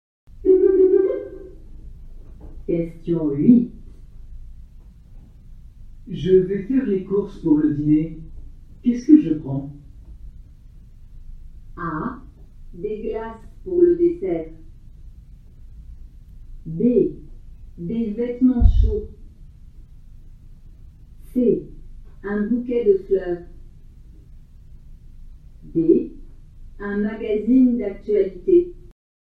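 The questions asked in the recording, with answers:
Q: Qu'est-ce que je prends?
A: A: Des glaces pour le dessert.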